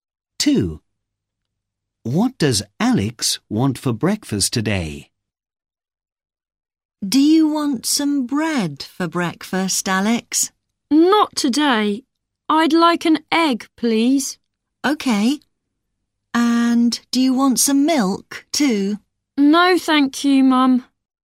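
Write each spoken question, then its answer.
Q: What does Alex want for breakfast today?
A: an egg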